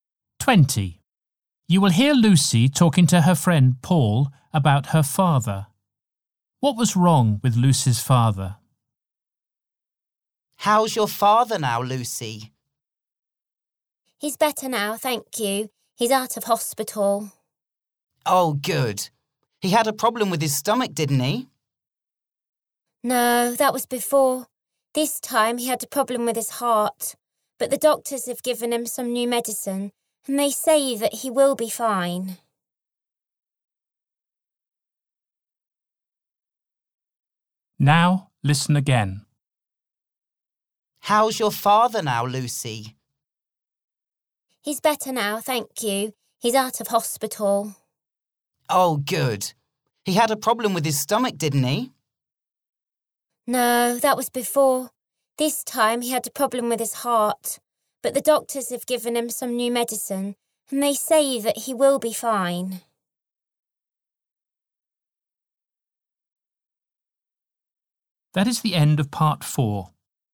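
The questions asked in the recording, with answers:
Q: What was wrong with Lucy's father?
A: A problem with his heart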